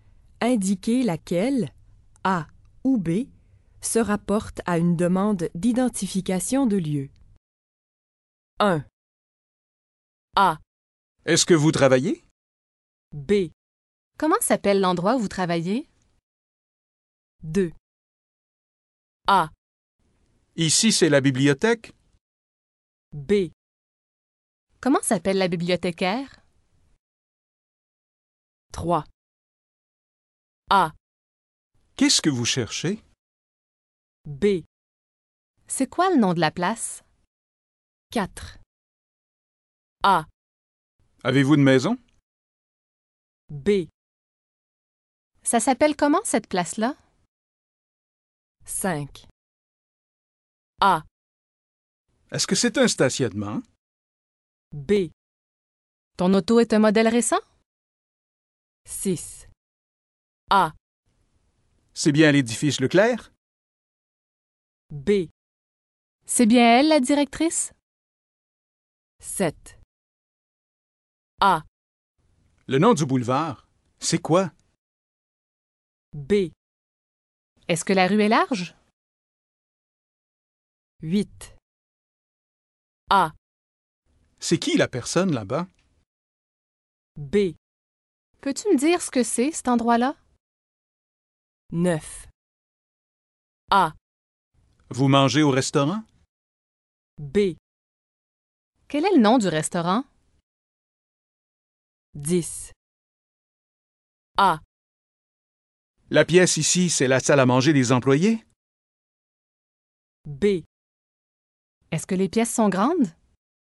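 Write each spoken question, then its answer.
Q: Indiquez laquelle, A ou B, se rapporte à une demande d'identification de lieu.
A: B: Comment s'appelle l'endroit où vous travaillez?

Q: Indiquez laquelle, A ou B, se rapporte à une demande d'identification de lieu.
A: B: C'est quoi le nom de la place?

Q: Indiquez laquelle, A ou B, se rapporte à une demande d'identification de lieu.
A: B: Ça s'appelle comment cette place-là?

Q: Indiquez laquelle, A ou B, se rapporte à une demande d'identification de lieu.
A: A: Est-ce que c'est un stationnement?

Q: Indiquez laquelle, A ou B, se rapporte à une demande d'identification de lieu.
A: A: C'est bien l'édifice Leclerc?

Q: Indiquez laquelle, A ou B, se rapporte à une demande d'identification de lieu.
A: A: Le nom du boulevard, c'est quoi?

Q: Indiquez laquelle, A ou B, se rapporte à une demande d'identification de lieu.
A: B: Peux-tu me dire ce que c'est, cet endroit-là?

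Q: Indiquez laquelle, A ou B, se rapporte à une demande d'identification de lieu.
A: B: Quel est le nom du restaurant?

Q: Indiquez laquelle, A ou B, se rapporte à une demande d'identification de lieu.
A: A: La pièce ici, c'est la salle à manger des employés?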